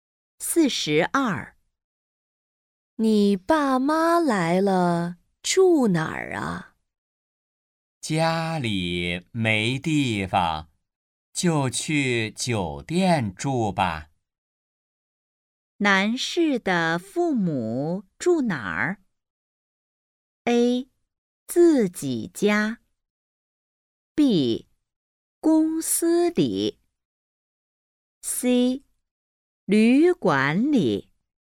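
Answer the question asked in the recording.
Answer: C: 旅馆里。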